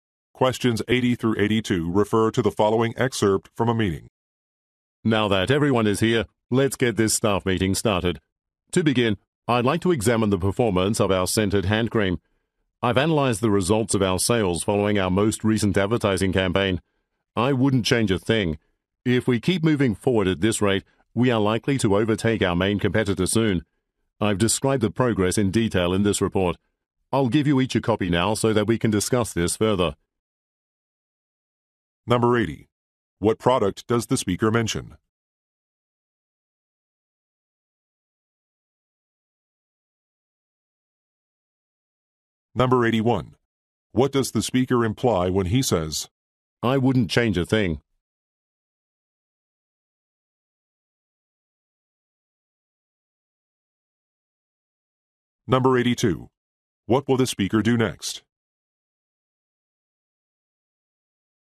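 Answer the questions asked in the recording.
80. Scented hand cream
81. The advertising campaign was successful
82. Hand out copies of a report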